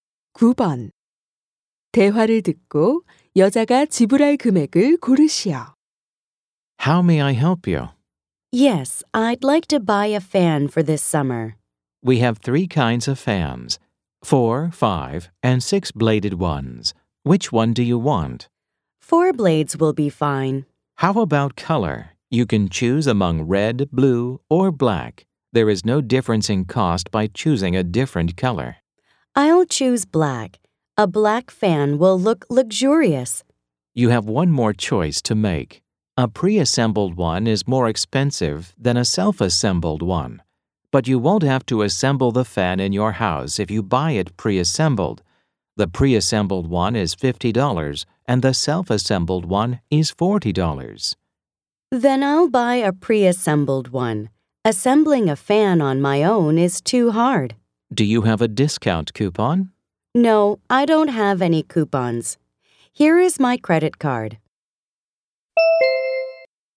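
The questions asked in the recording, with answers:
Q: 대화를 듣고 여자가 지불할 금액을 고르시오.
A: $50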